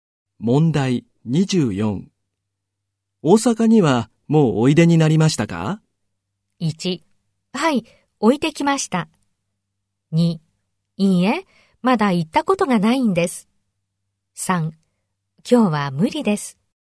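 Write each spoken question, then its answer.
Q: 大阪にはもうおいでになりましたか?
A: 2: いいえ、まだ行ったことがないんです。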